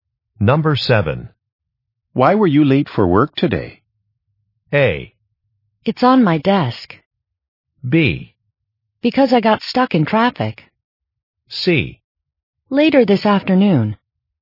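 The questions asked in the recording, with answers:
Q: Why were you late for work today?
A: B: Because I got stuck in traffic.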